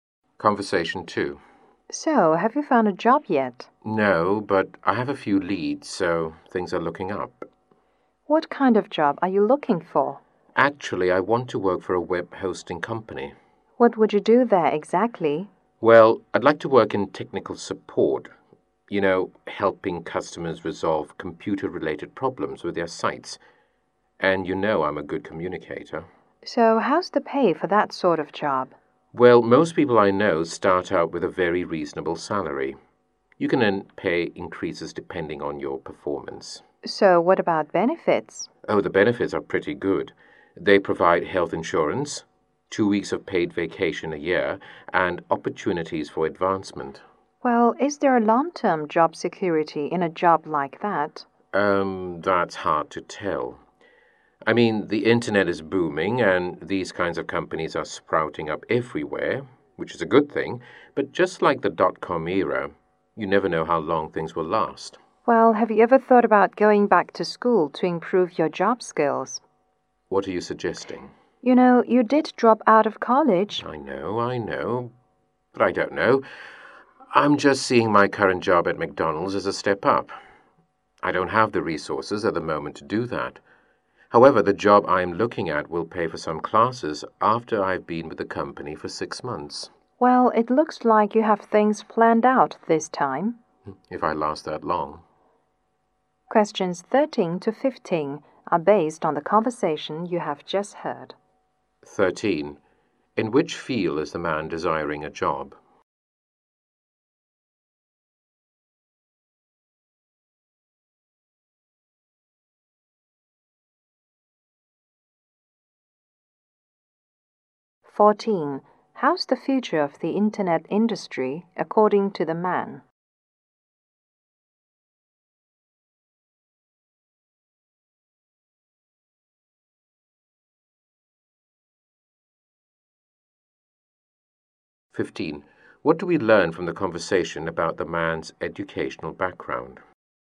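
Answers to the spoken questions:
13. Technical support at a web hosting company
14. Booming now, but it's hard to tell how long it will last
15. He dropped out of college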